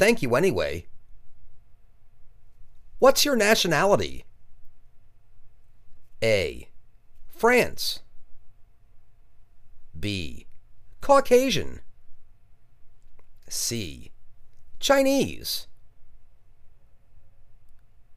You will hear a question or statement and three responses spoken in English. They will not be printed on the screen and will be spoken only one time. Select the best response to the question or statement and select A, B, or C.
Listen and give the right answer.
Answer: Chinese